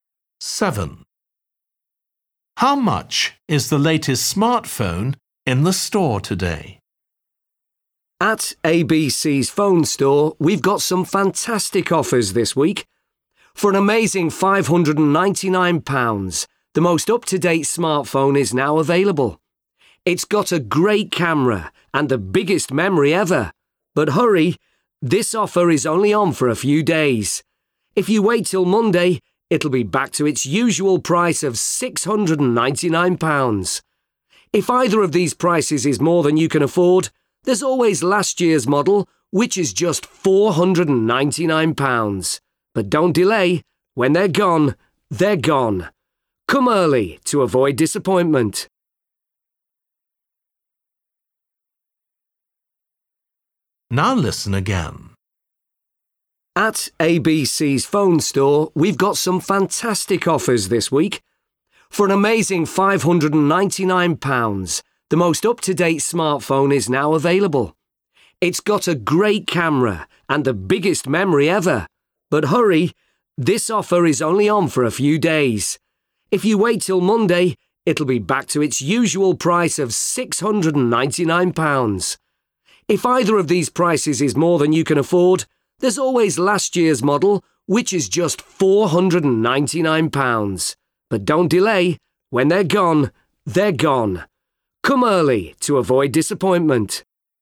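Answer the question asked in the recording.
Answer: £599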